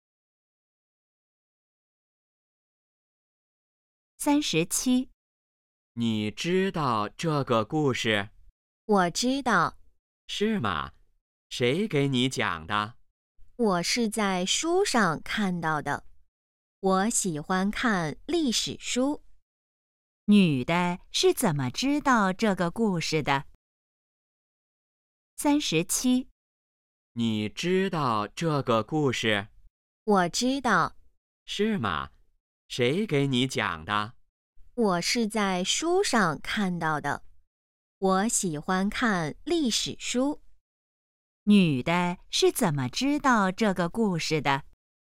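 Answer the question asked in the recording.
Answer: 在书上看到的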